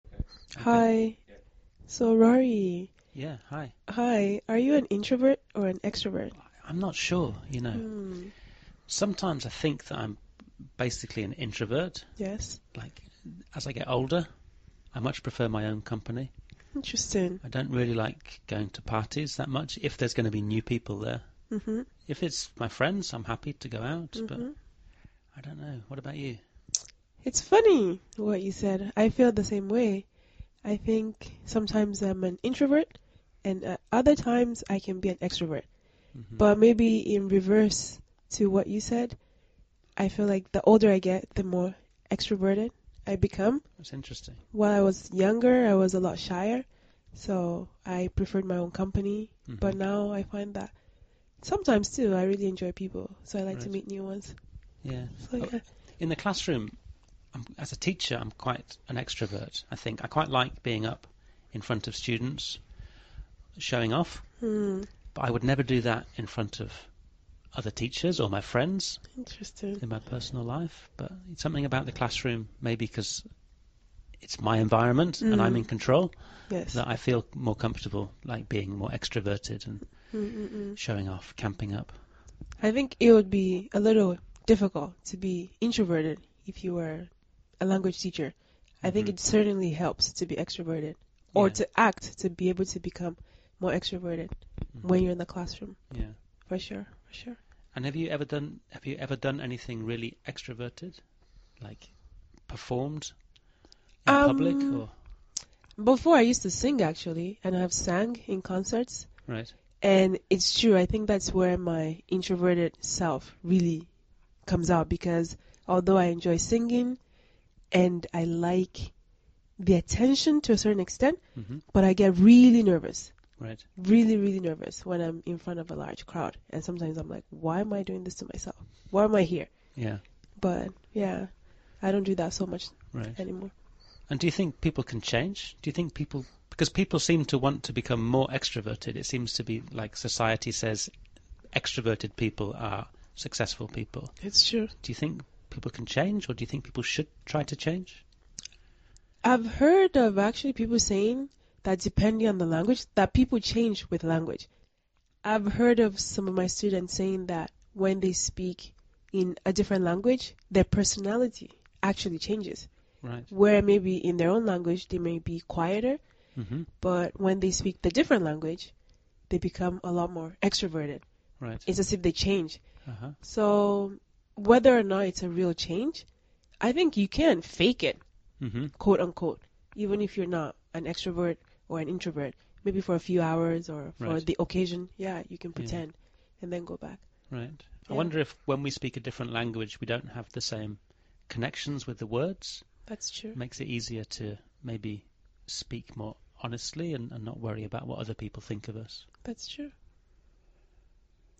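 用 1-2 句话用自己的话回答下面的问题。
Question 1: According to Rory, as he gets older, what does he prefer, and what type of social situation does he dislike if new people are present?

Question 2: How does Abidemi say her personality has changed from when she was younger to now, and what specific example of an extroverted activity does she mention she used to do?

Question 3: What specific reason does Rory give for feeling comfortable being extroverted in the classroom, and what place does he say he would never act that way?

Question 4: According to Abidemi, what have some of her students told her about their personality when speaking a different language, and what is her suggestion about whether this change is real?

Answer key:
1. He prefers his own company, and he doesn't like going to parties where there will be new people.
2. She was shyer when she was younger but has become more extroverted and enjoys meeting people now; she used to sing in concerts.
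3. The classroom is his environment and he is in control; he would never act that way in front of other teachers or his friends.
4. Their personality changes and they become more extroverted in another language; whether or not the change is real, she thinks you can fake it for a while and then go back.

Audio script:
Hi. Are you an introvert or an extrovert?
Rory
I'm not sure, you know. Sometimes I think that I'm basically an introvert. Like as I get older, I much prefer my own company.
Interesting.
Rory
I don't really like going to parties that much if there's going to be new people there.
RoryI don't really like going to parties that much if there's going to be new people there. If it's my friends, I'm happy to go out, but I don't know. What about you?
AbidemiIt's funny what you said. I feel the same way. I think sometimes I'm an introvert and other times I can be an extrovert. But maybe in reverse to what you said. 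I feel like the older I get, the more extroverted I become.
AbidemiWhile I was younger, I was a lot shier, so I preferred my own company. But now I find that sometimes too, I really enjoy people. So I like to meet new ones. So yeah.
In the classroom, as a teacher, I'm quite an extrovert I think. I quite like being up in front of students and showing of, but I would never do that in front of other teachers or my friends, in my personal life.
RoryBut something about the classroom maybe because it's my environment and I'm in control that I feel more comfortable, like being more extroverted and showing off, camping up.
AbidemiI think it would be a little difficult to be introverted if you were a language teacher. I think it certainly helps to be extroverted or to act to be able to become more extroverted when you're in the classroom for sure. For sure.
And have you ever done anything really extroverted, like performed in public?
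AbidemiBefore I used to sing actually, and I have sang in concerts.
AbidemiAnd it's true. I think that's where my introverted self really comes out because although I enjoy singing, and I like the attention to a certain extent, but I get really nervous. Really, really nervous when I'm in front of a large crowd. And sometimes I'm like, "Why am I doing this to myself? Why am I here?"
AbidemiBut yeah, I don't do that so much anymore.
And do you think people can change? Do you think people – because people seem to want to become more extroverted? It seems to be like society says extroverted people are successful people.
RoryDo you think people can change or do you think people should try to change?
AbidemiI've heard of actually people saying that depending on the language that people change with the language. I've heard of some of my students saying that when they speak in a different language, their personality actually changes, where maybe in their own language, they may be quieter. 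But when they speak the different language, they become a lot more extroverted.
AbidemiIt's as if they change. So whether or not it's a real change I think you can "fake it" quote-unquote even if you're not an extrovert or an introvert. Maybe for a few hours or for the occasion. Yeah, you can pretend, and then go back.
I wonder if when we speak a different language, we don't have the same connections with the words.
RoryIt makes it easier to maybe speak more honestly and not worry about what other people think of us.

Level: CEFRB2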